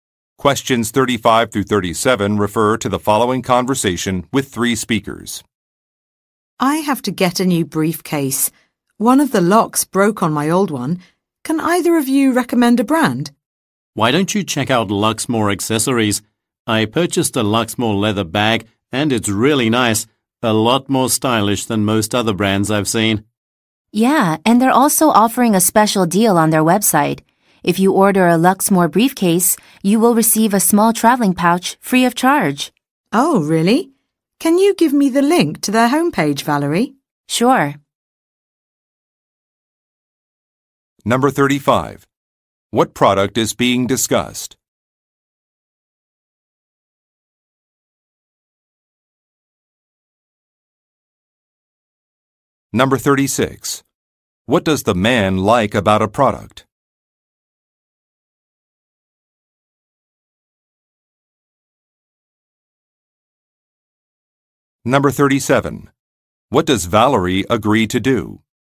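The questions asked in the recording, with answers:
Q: What product is being discussed?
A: A briefcase

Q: What does Valerie agree to do?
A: Give the link to the company's homepage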